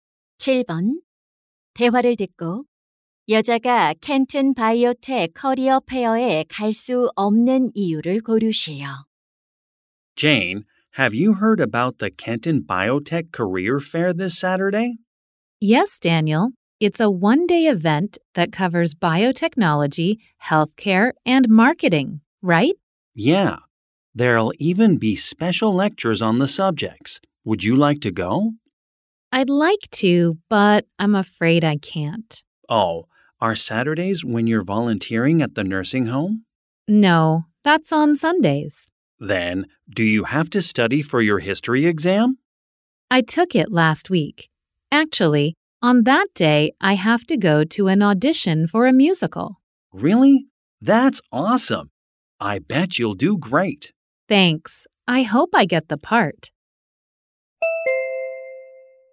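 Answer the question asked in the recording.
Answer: 뮤지컬 오디션에 가야 해서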